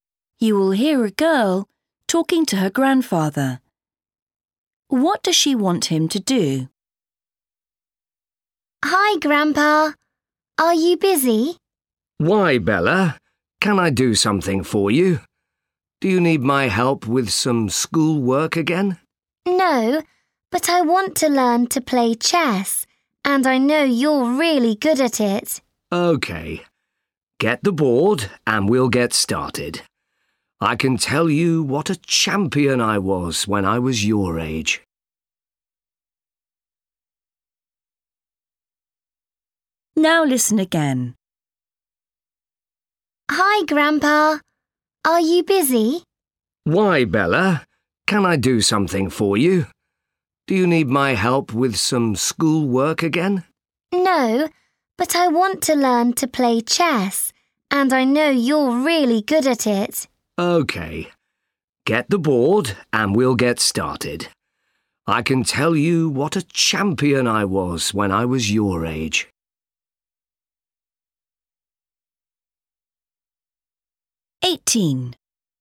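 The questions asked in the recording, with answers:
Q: What does she want him to do?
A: Teach her to play chess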